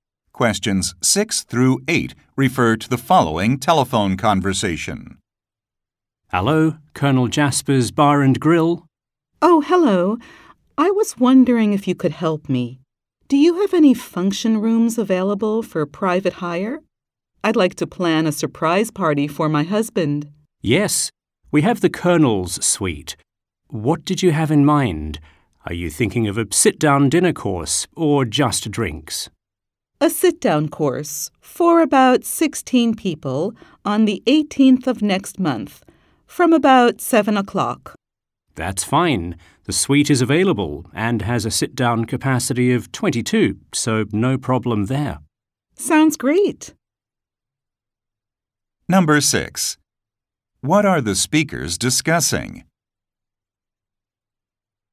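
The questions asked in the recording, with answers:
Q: What are the speakers discussing?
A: Booking a function room for a surprise party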